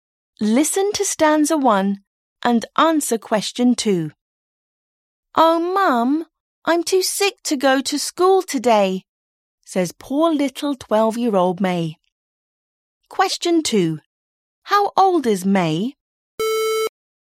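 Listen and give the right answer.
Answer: 12 years old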